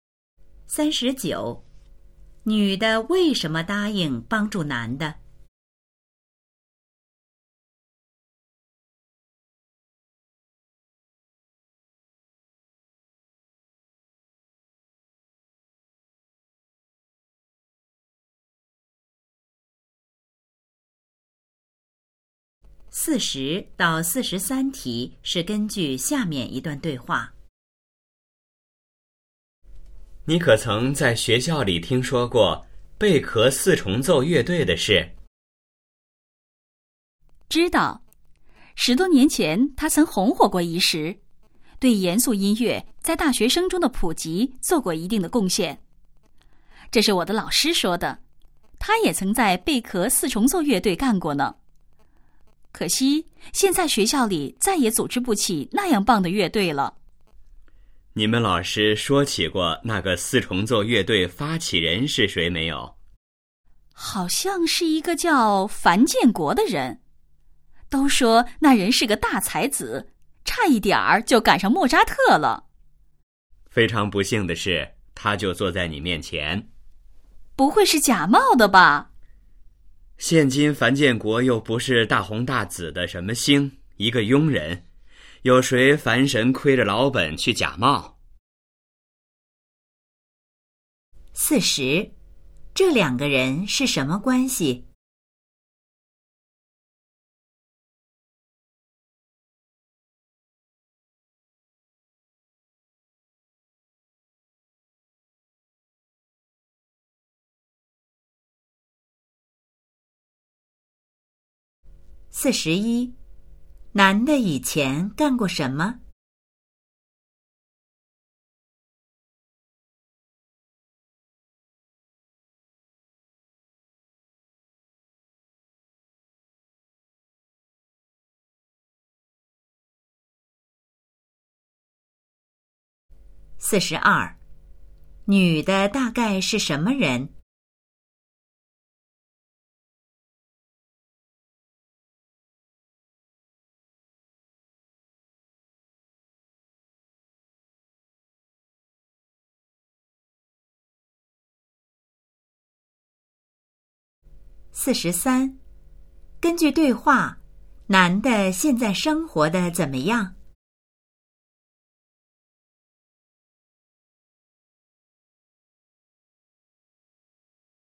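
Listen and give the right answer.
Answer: 发起贝壳四重奏乐队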